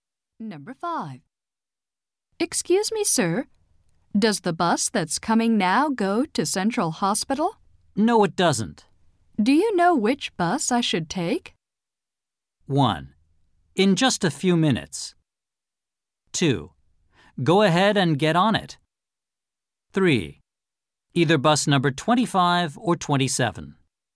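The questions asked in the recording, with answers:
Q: Do you know which bus I should take?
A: 3: Either bus number 25 or 27.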